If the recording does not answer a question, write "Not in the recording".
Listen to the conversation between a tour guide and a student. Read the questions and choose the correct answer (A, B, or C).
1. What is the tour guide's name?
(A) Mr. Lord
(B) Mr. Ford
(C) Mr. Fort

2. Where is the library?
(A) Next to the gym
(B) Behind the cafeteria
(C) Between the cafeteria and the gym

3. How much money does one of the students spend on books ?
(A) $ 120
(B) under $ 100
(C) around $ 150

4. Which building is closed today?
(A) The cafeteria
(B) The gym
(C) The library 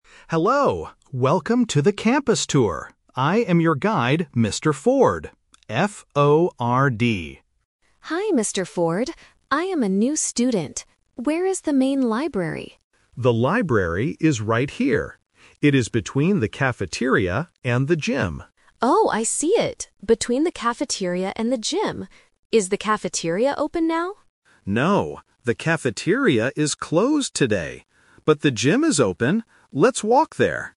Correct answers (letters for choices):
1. B
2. C
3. Not in the recording
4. A

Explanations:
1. The guide clearly introduces himself and spells his name: "I am your guide, Mr. Ford. F-O-R-D." Why the traps are wrong: Options A (Lord) and C (Fort) are phonetic traps that sound very similar to "Ford." This tests the student's ability to listen to the exact spelling provided.
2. David states the location clearly, and Emma repeats it: "It is between the cafeteria and the gym." Why the traps are wrong: Option A uses the correct building ("gym") but the wrong preposition ("next to"). Option B introduces a plausible preposition ("behind") but it is not mentioned in the audio.
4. When Emma asks if the cafeteria is open, David replies, "No, the cafeteria is closed today." Why the traps are wrong: Option B is a trap because the gym is mentioned immediately after, but David says the gym is "open". Option C is a trap because the library is the main topic of the conversation, but it is not closed.

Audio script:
David: Hello! Welcome to the campus tour. I am your guide, Mr. Ford. F-O-R-D.
Emma: Hi, Mr. Ford. I am a new student. Where is the main library?
David: The library is right here. It is between the cafeteria and the gym.
Emma: Oh, I see it. Is the cafeteria open now?
David: No, the cafeteria is closed today. But the gym is open. Let's walk there.